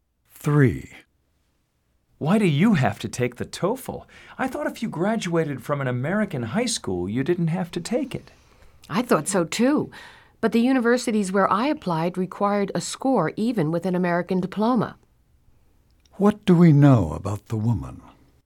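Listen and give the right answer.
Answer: She graduated from an American high school but still has to take the TOEFL.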